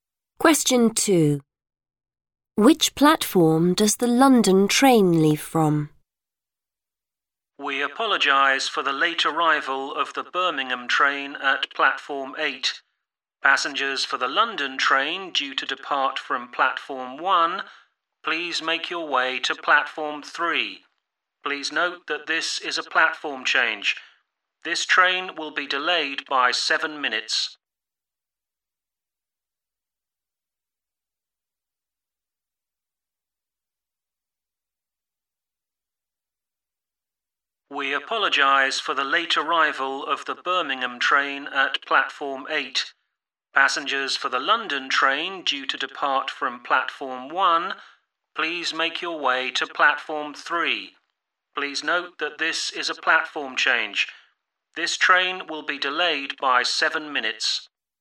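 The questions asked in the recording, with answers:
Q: Which platform does the London train leave from?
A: Platform 3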